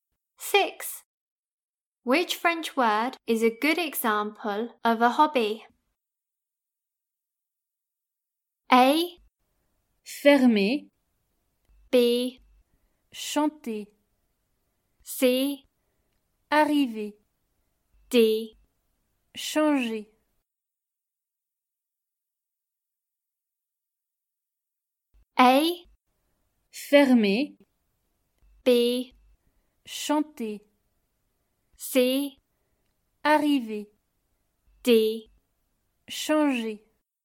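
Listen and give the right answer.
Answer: B: Chanter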